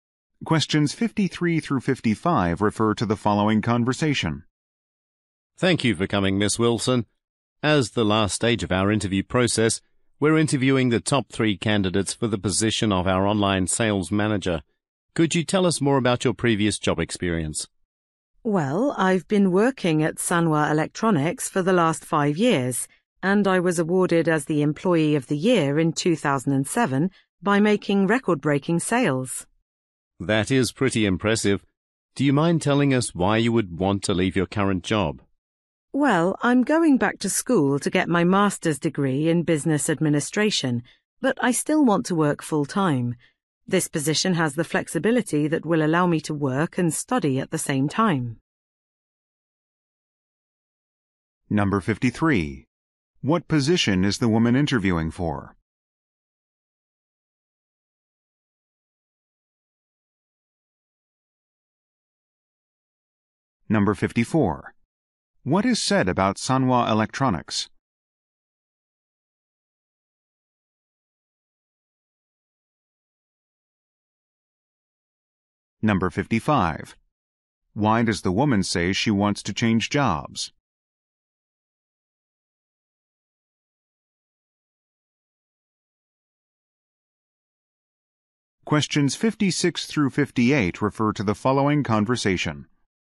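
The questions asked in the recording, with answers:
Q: What position is the woman interviewing for?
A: Online sales manager

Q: What is said about Sanwa Electronics?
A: The woman has worked there for 5 years

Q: Why does the woman say she wants to change jobs?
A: She needs flexibility to study for a master's degree while working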